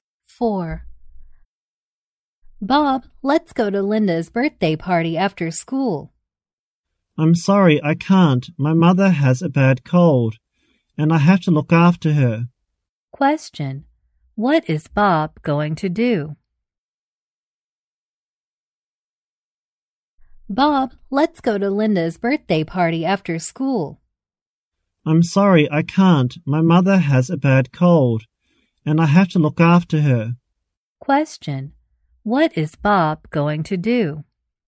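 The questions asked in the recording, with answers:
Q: what is Bob going to do?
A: Look after his mother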